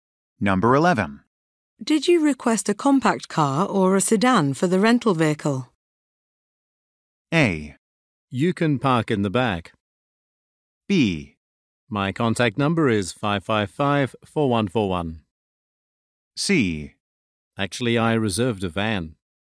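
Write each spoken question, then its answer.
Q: Did you request a compact car or a sedan for the rental vehicle?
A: C: Actually, I reserved a van.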